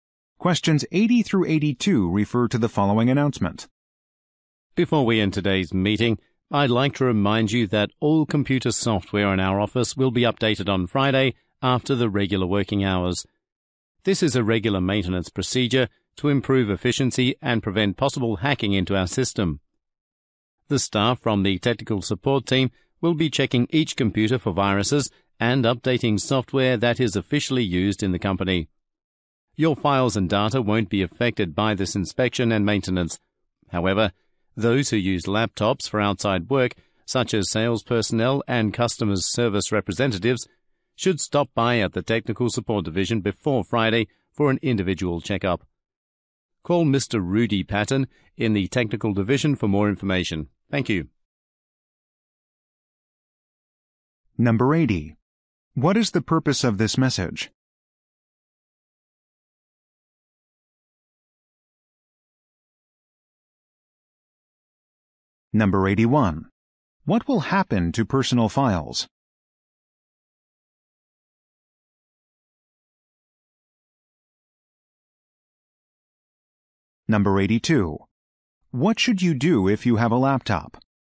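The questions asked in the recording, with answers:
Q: What is the purpose of this message?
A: To announce a software update on Friday

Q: What will happen to personal files?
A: They won't be affected

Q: What should you do if you have a laptop?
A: Stop by the Technical Support Division before Friday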